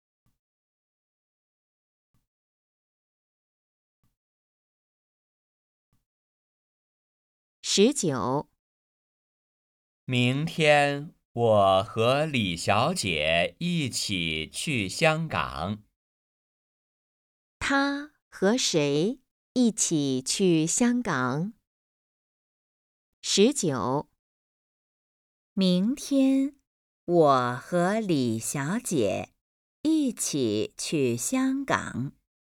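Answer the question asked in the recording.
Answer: 李小姐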